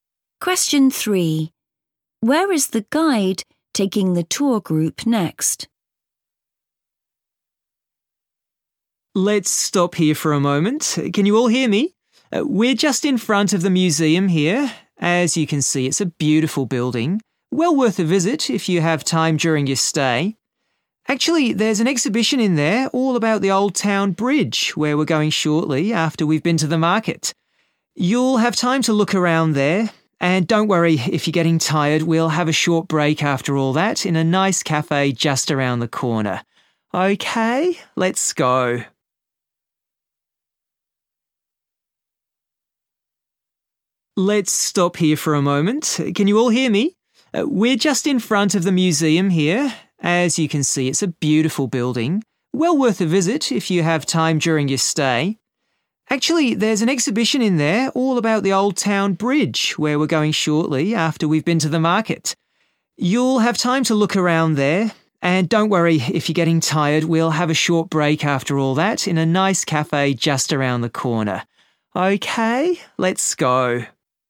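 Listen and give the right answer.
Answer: To the market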